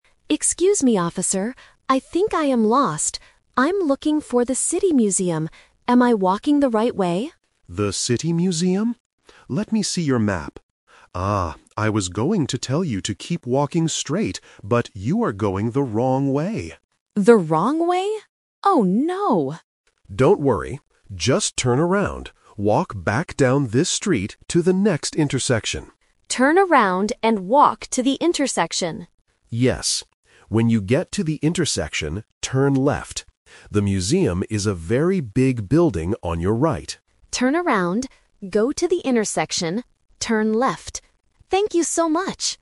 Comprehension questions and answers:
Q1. What is the tourist's problem?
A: He is going the wrong way.

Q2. What is the first thing the tourist needs to do?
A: Turn around.

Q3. Where should the tourist turn left?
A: At the next intersection.

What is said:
Tourist: Excuse me, officer. I think I am lost. I'm looking for the City Museum. Am I walking the right way?
Police Officer: The City Museum? Let me see your map. Ah, I was going to tell you to keep walking straight, but you are going the wrong way.
Tourist: The wrong way? Oh no!
Police Officer: Don't worry. Just turn around. Walk back down this street to the next intersection.
Tourist: Turn around and walk to the intersection.
Police Officer: Yes. When you get to the intersection, turn left. The museum is a very big building on your right.
Tourist: Turn around, go to the intersection, turn left. Thank you so much!